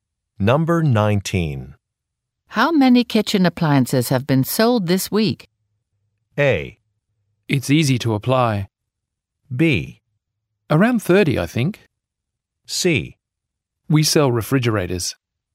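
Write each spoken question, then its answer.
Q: How many kitchen appliances have been sold this week?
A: B: Around 30, I think.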